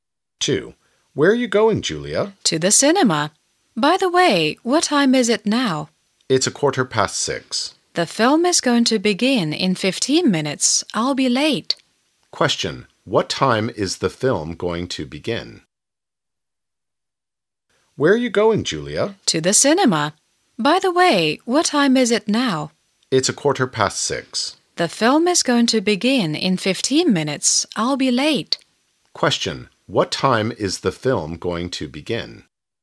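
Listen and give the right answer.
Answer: 6:30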